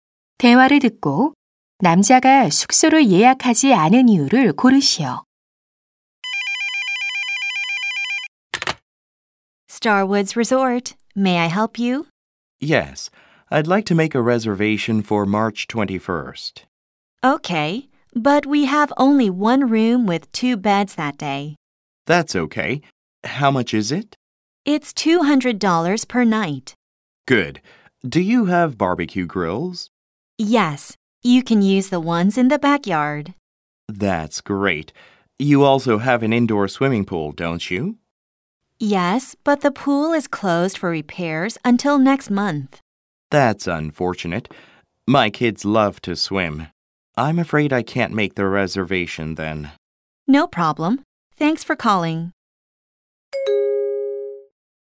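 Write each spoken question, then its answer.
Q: 대화를 듣고 남자가 숙소를 예약하지 않은 이유를 고르시오.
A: 실내 수영장이 수리 중이라 이용할 수 없어서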